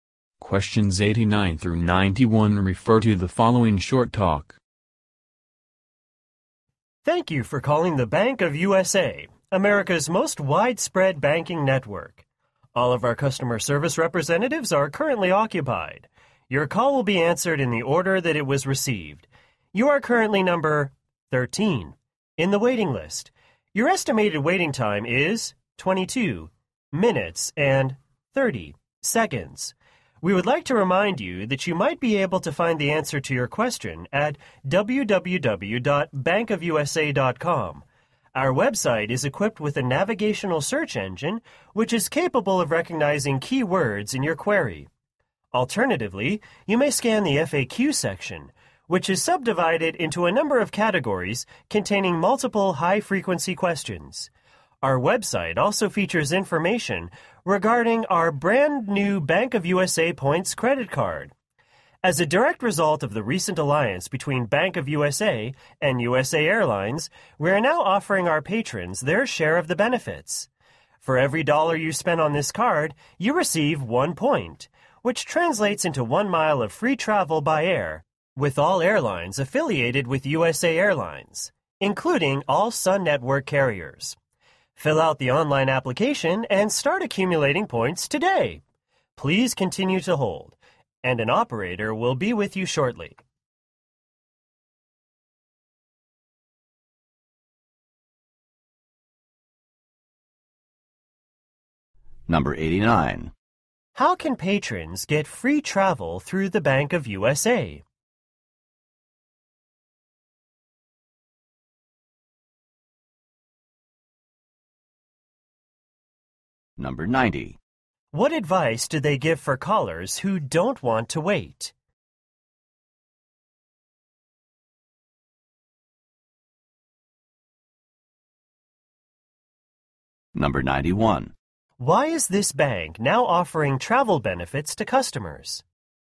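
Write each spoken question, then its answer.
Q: How can patrons get free travel through the Bank of USA?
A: Earn points with the Bank of USA Points credit card

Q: What advice do they give for callers who don't want to wait?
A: Find the answer on the bank's website

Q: Why is this bank now offering travel benefits to customers?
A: Because of its new alliance with USA Airlines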